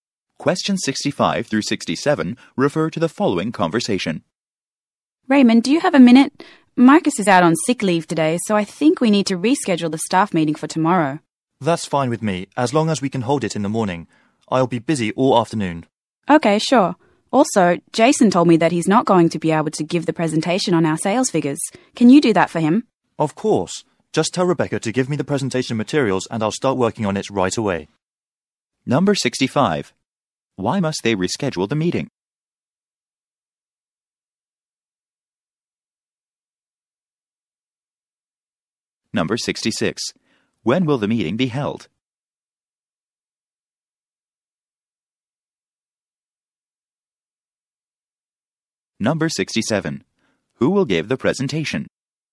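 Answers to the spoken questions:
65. Marcus is out on sick leave
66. Tomorrow morning
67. Raymond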